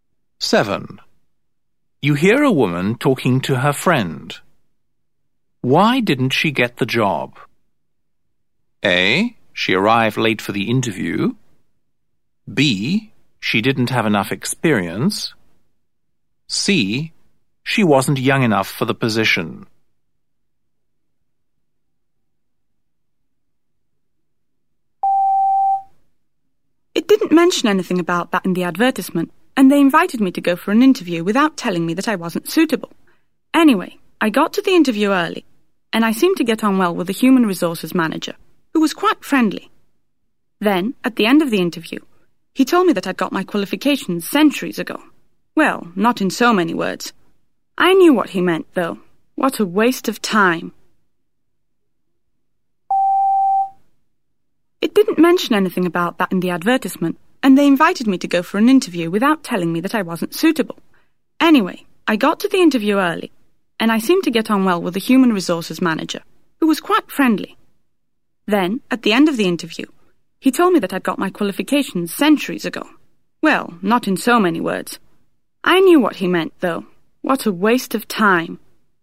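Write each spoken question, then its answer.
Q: Why didn't she get the job?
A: C: She wasn't young enough for the position.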